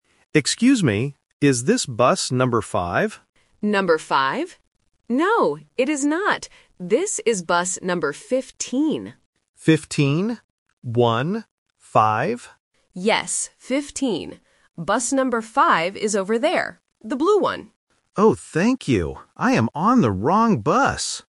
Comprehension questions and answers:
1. Which bus does the man want to take?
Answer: Bus number 5

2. Which bus is the man on right now?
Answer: Bus number 15

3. What color is bus number five?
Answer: Blue

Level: A1